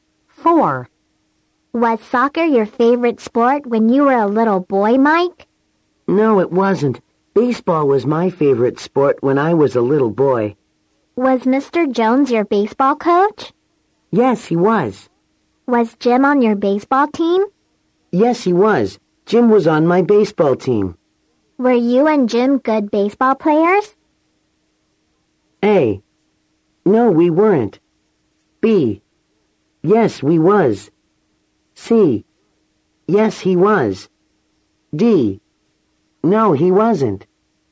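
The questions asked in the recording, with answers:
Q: Were you and Jim good baseball players?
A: A: No, we weren't.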